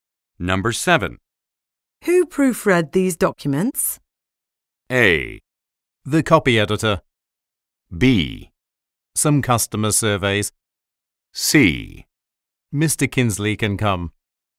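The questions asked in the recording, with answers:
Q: Who proofread these documents?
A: A: The copy editor.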